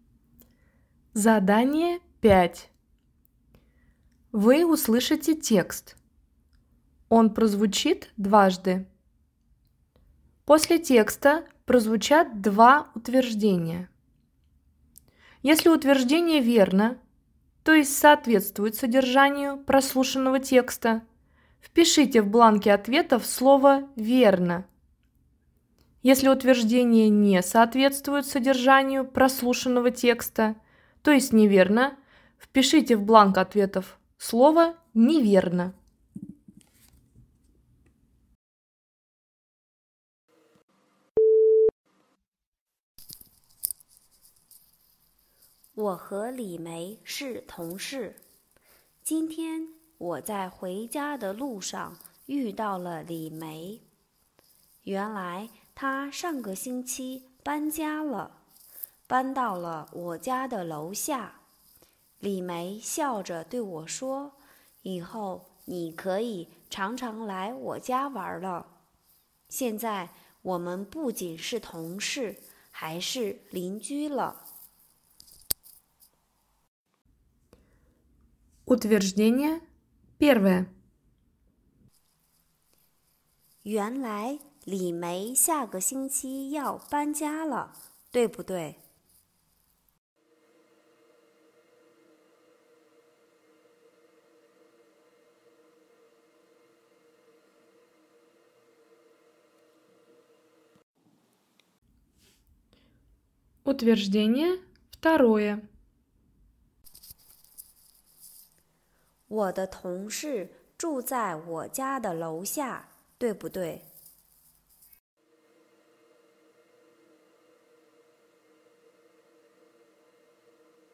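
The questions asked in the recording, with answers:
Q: 原来李梅下个星期要搬家了,对不对?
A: 不对(她上个星期搬家了)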